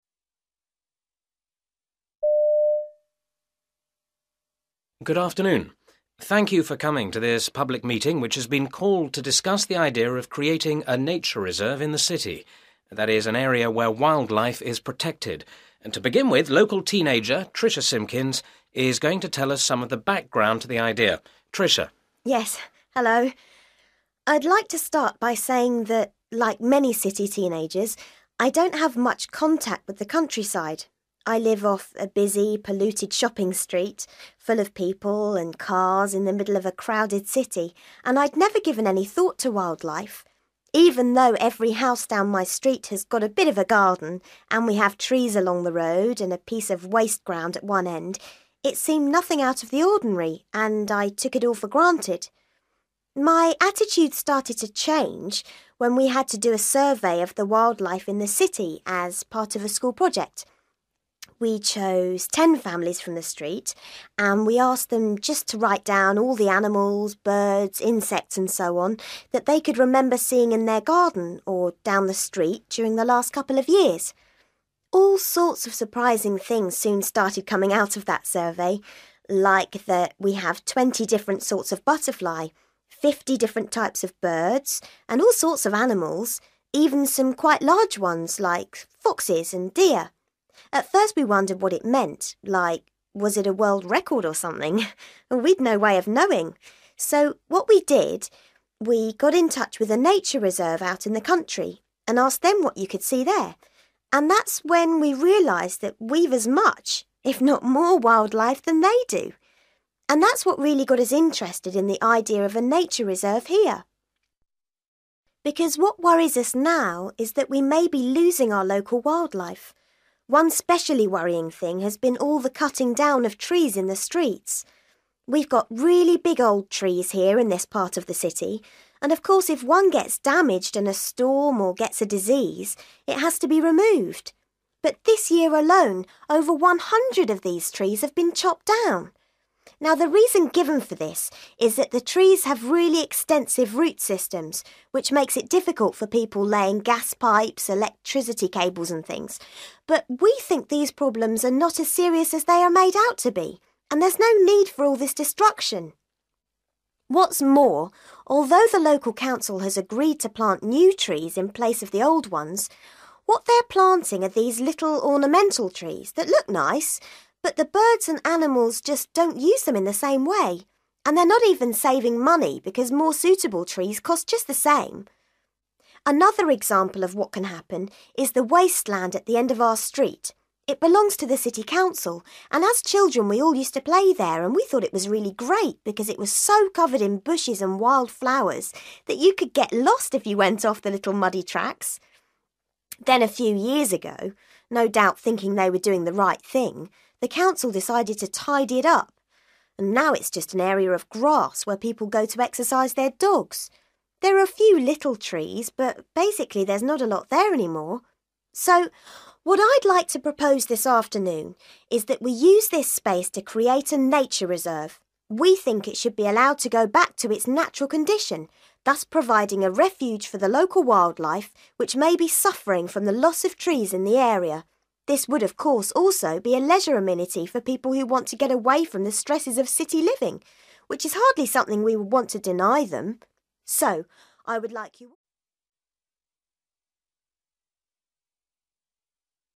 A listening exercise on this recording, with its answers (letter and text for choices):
For questions 24-30, choose the best answer (A, B or C).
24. How did Tricia once feel about the countryside?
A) She preferred it to the city.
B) She paid no attention to it.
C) She wanted others to experience it.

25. Why did Tricia take part in a wildlife survey?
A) She was required to do it.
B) She preferred it to being in school.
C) She was asked to do it by her neighbours.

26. What does Tricia say about the results of the survey?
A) They were unsatisfactory.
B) They were confusing.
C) They were unexpected.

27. What does Tricia say about the problems created by trees?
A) People exaggerate them.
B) People ignore them.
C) People accept them.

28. According to Tricia, what is wrong with the trees the council is planting?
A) They are expensive to replace.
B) They fail to attract wildlife.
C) They are too small for the area.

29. What used to happen in the wasteland at the end of Tricia's street?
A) Dog owners used to go there.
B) People used to leave rubbish there.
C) Children used to play there.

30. What is Tricia's suggestion for the new nature reserve?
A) to allow the planting of trees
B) to protect it from visitors.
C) to let it go wild.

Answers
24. B) She paid no attention to it.
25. A) She was required to do it.
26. C) They were unexpected.
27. A) People exaggerate them.
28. B) They fail to attract wildlife.
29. C) Children used to play there.
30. C) to let it go wild.

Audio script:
Man: Good afternoon. Thank you for coming to this public meeting which has been called to discuss the idea of creating a nature reserve in the city – that is, an area where wildlife is protected, and to begin with, local teenager, Tricia Simpkins, is going to tell us some of the background to the idea. Tricia.
Tricia: Yes. Hello ... I'd like to start by saying that, like many city teenagers, I don't have much contact with the countryside. I live off a busy, polluted shopping street, full of people and cars, in the middle of a crowded city and I'd never given any thought to wildlife. Even though every house down my street has got a bit of a garden and we have trees along the road and a piece of waste ground at one end, it seemed nothing out of the ordinary, and I took it all for granted.
My attitude started to change when we had to do a survey of the wildlife in the city as part of a school project. We chose ten families from the street and we asked them just to write down all the animals, birds, insects and so on that they could remember seeing in their garden or down the street during the last couple of years.
All sorts of surprising things soon started coming out of that survey; like that we have twenty different sorts of butterfly, fifty different types of birds, and all sorts of animals, even some quite large ones like foxes and deer. At first we wondered what it meant, like was it a world record or something? We'd no way of knowing. So what we did, we got in touch with a nature reserve out in the country, and asked them what you could see there. And that's when we realised that we've as much, if not more wildlife than they do. And that's what really got us interested in the idea of a nature reserve here.
Because what worries us now is that we may be losing our local wildlife. One specially worrying thing has been all the cutting down of trees in the streets. We've got really big old trees here in this part of the city, and of course if one gets damaged in a storm or gets a disease, it has to be removed. But this year alone, over one hundred of these trees have been chopped down. Now the reason given for this is that the trees have really extensive root systems which makes it difficult for people laying gas pipes, electricity cables and things. But we think these problems are not as serious as they are made out to be, and there's no need for all this destruction.
What's more, although the local council has agreed to plant new trees in place of the old ones, what they're planting are these little ornamental trees that look nice, but the birds and animals just don't use them in the same way. And they're not even saving money, because more suitable trees cost just the same.
Another example of what can happen is the wasteland at the end of our street. It belongs to the city council and as children we all used to play there and we thought it was really great because it was so covered in bushes and wild flowers that you could get lost if you went off the little muddy tracks. Then, a few years ago, no doubt thinking they were doing the right thing, the council decided to tidy it up. Now it's just an area of grass where people go to exercises their dogs. There are a few little trees, but basically there's not a lot there any more.
So, what I'd like to propose this afternoon is that we use this space to create a nature reserve. We think it should be allowed to go back to its natural condition, thus providing a refuge for the local wildlife which may be suffering from the loss of trees in the area. This would, of course, also be a leisure amenity for people who want to get away from the stresses of city living, which is hardly something we would want to deny them.
So, I would like you ....